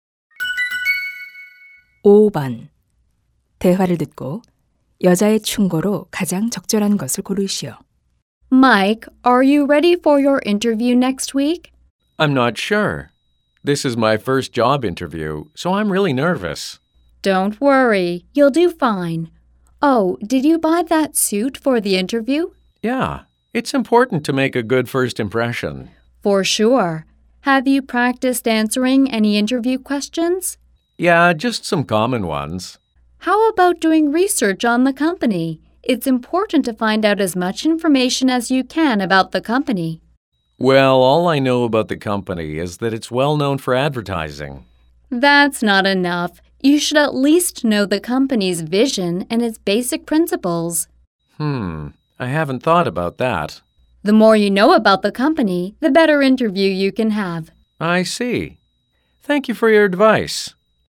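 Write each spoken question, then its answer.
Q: 대화를 듣고 여자의 충고로 가장 적절한 것을 고르시오.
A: 면접 전에 회사에 대해 조사하라.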